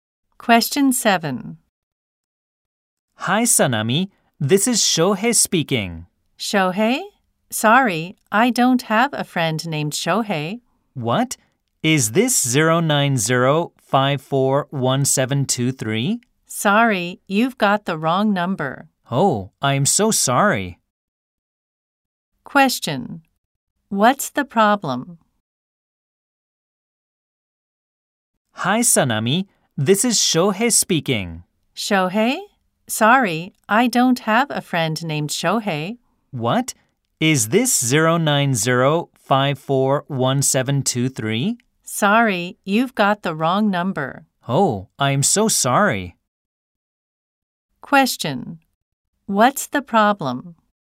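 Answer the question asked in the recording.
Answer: Shohei called the wrong number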